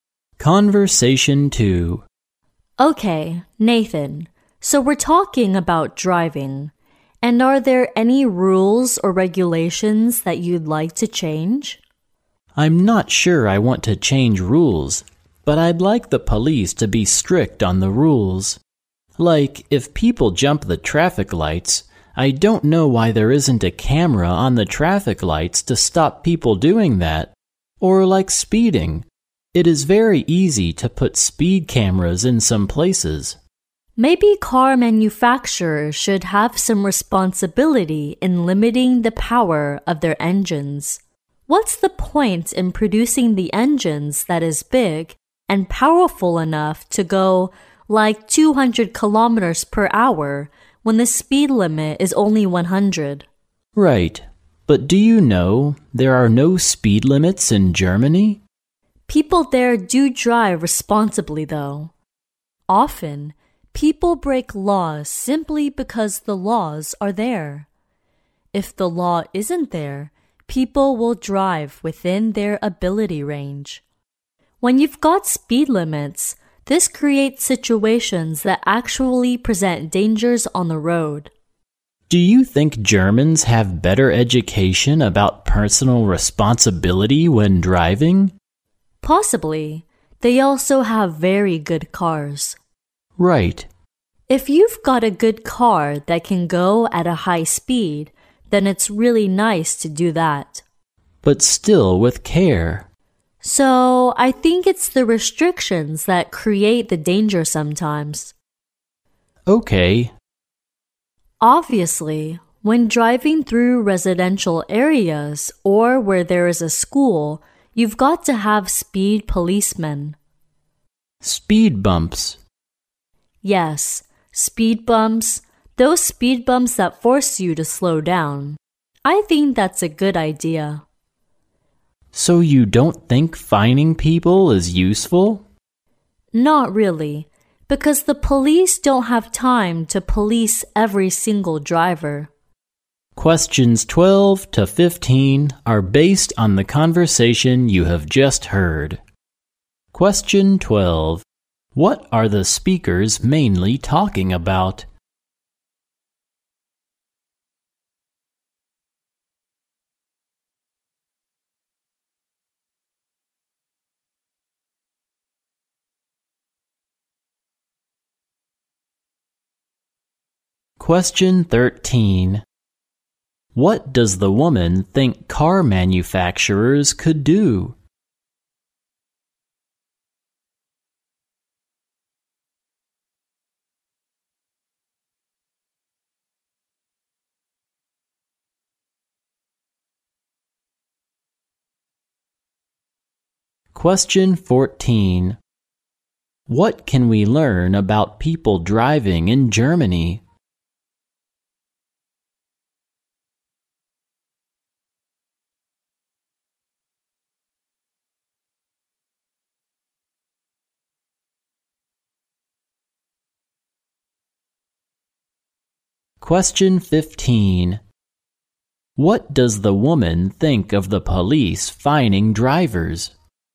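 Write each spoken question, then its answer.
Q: What are the speakers mainly talking about?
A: Driving rules and regulations

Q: What can we learn about people driving in Germany?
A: They drive responsibly though there are no speed limits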